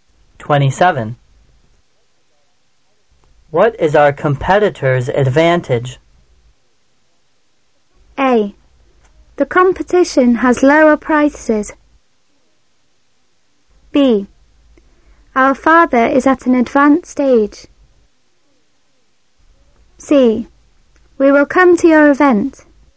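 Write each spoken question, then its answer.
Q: What is our competitor's advantage?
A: A: The competition has lower prices.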